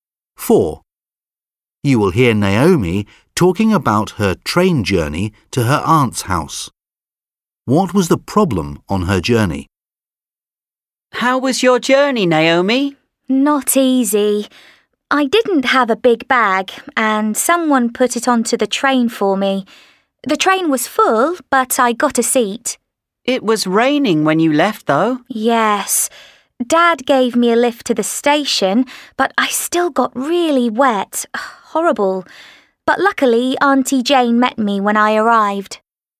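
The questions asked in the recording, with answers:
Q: What was the problem on her journey?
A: She got really wet in the rain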